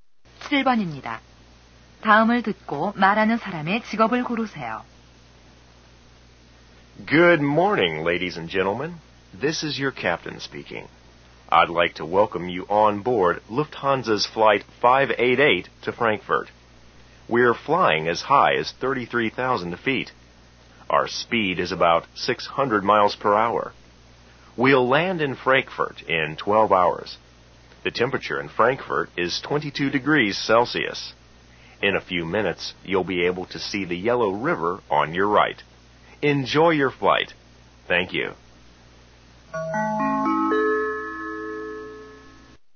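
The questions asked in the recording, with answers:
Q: 다음을 듣고 말하는 사람의 직업을 고르세요.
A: 비행기 조종사(기장)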